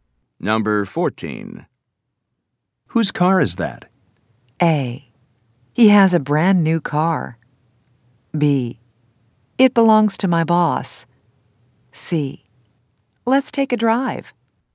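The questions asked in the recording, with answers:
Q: Whose car is that?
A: B: It belongs to my boss.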